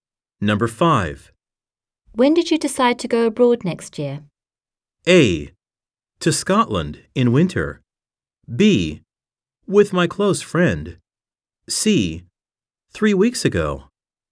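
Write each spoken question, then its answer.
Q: When did you decide to go abroad next year?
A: C: 3 weeks ago.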